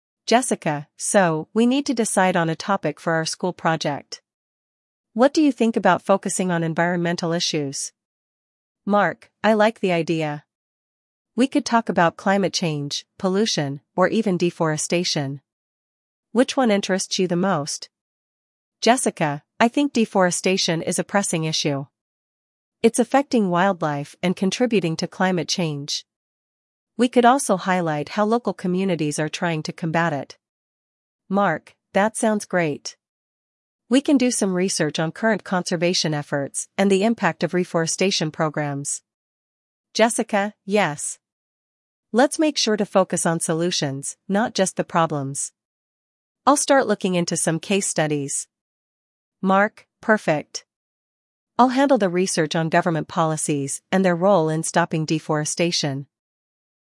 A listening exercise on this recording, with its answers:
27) What topic do Jessica and Mark decide to focus on?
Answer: Environmental issues.

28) What specific issue within environmental issues does Jessica suggest?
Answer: Deforestation.

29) What aspect of deforestation does Jessica want to focus on?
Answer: How local communities are combating deforestation.

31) What is Jessica's approach to presenting the issue?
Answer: Focus on solutions and case studies.

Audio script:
Jessica: So, we need to decide on a topic for our school project. What do you think about focusing on environmental issues?
Mark: I like the idea. We could talk about climate change, pollution, or even deforestation. Which one interests you the most?
Jessica: I think deforestation is a pressing issue. It's affecting wildlife and contributing to climate change. We could also highlight how local communities are trying to combat it.
Mark: That sounds great. We can do some research on current conservation efforts and the impact of reforestation programs.
Jessica: Yes! Let's make sure to focus on solutions, not just the problems. I'll start looking into some case studies.
Mark: Perfect. I'll handle the research on government policies and their role in stopping deforestation.